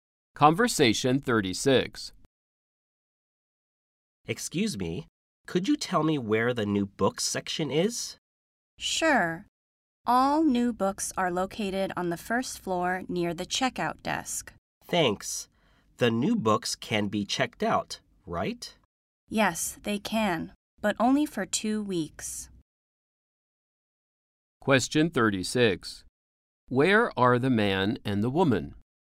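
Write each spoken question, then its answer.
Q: Where are the man and the woman?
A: In a library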